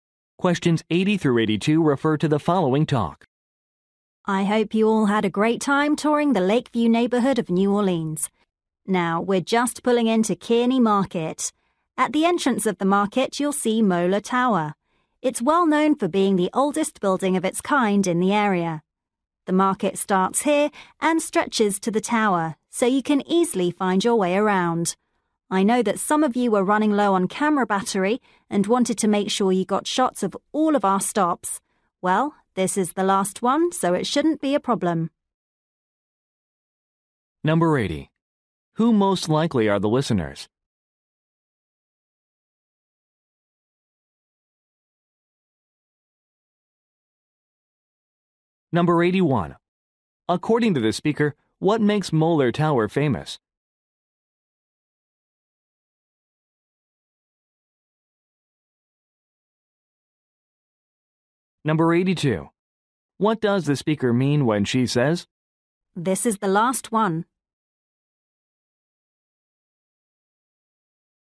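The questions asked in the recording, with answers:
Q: Who most likely are the listeners?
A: Tourists on a tour

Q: According to the speaker, what makes Mola Tower famous?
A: It is the oldest building of its kind in the area

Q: "This is the last one"?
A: Low camera batteries won't be a problem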